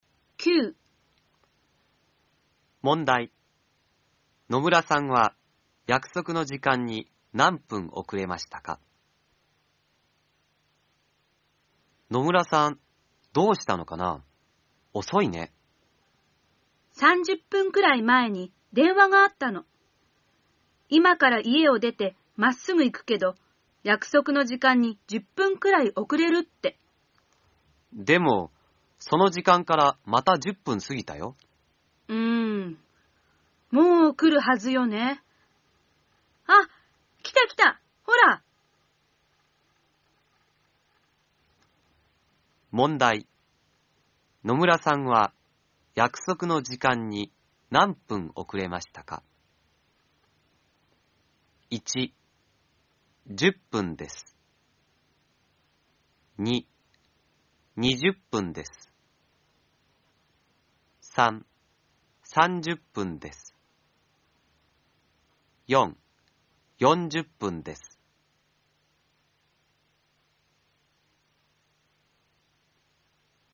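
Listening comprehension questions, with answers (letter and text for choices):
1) 野村さんは、やくそくの時間に何分おくれましたか。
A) 10分です。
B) 20分です。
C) 30分です。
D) 40分です。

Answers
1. B) 20分です。

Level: N4 ĐỀ 2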